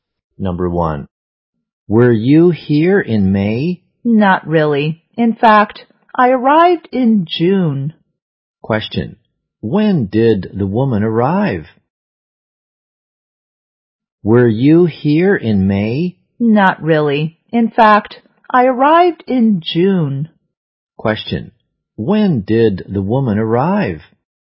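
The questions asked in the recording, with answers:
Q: when did the woman arrive?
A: In June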